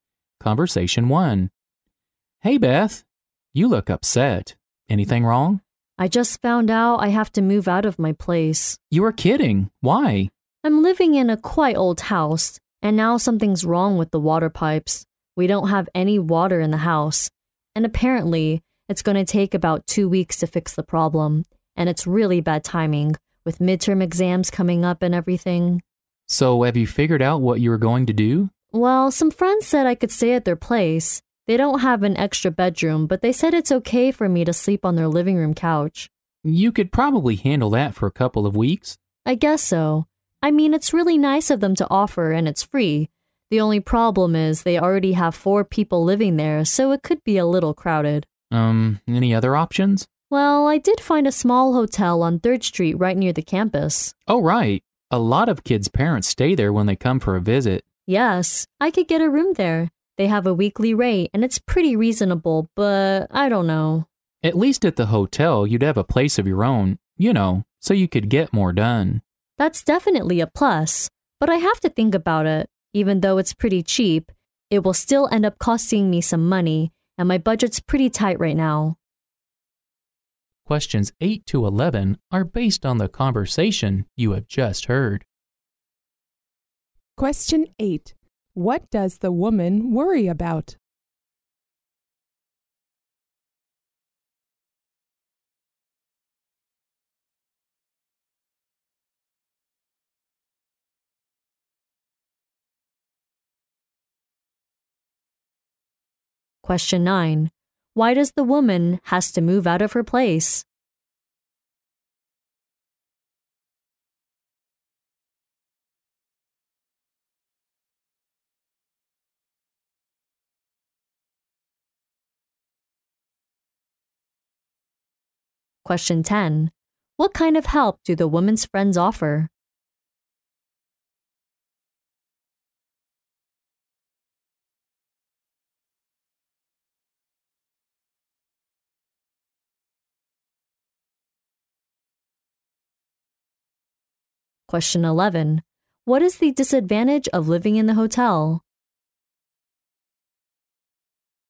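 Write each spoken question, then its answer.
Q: Why does the woman has to move out of her place?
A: The water pipes are broken, so there is no water in the house

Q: What kind of help do the woman's friends offer?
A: She can sleep on their living room couch for free

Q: What is the disadvantage of living in the hotel?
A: It will cost her money and her budget is tight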